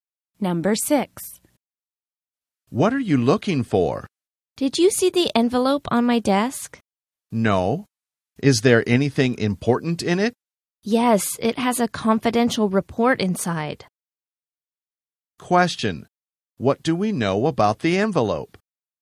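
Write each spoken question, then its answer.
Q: Question. What do we know about the envelope?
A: It contains a confidential report.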